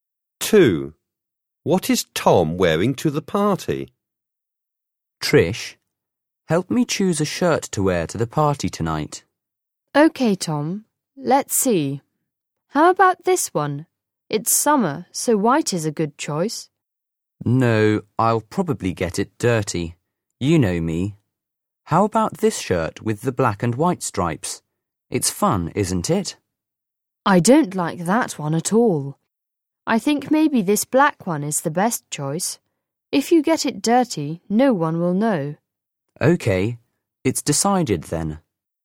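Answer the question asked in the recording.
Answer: a black shirt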